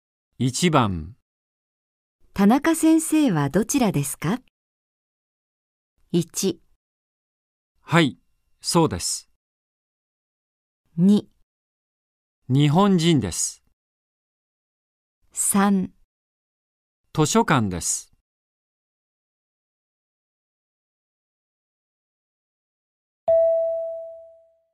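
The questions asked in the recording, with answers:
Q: 田中先生はどちらですか。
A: 3: 図書館です。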